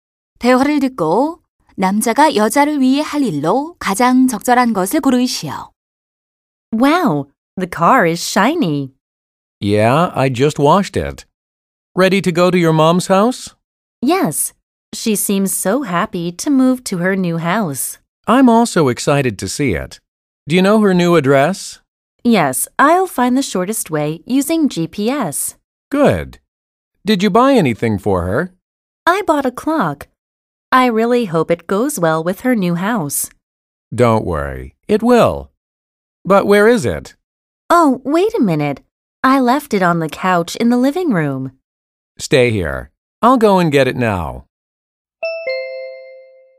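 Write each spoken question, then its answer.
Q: 대화를 듣고 남자가 여자를 위해 할 일로 가장 적절한 것을 고르시오.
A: 거실 소파에 둔 시계 가져오기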